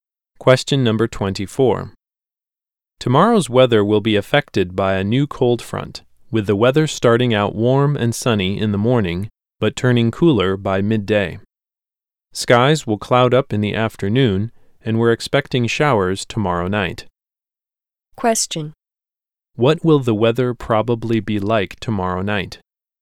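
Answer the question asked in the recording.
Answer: Showers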